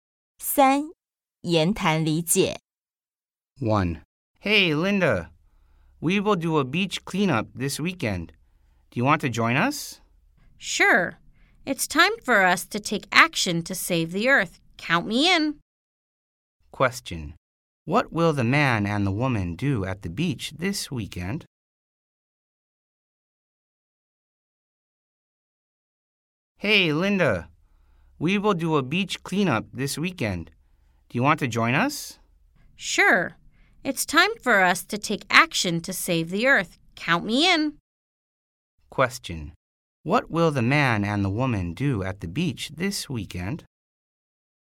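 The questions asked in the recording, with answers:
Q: What will the man and the woman do at the beach this weekend?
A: Clean up the beach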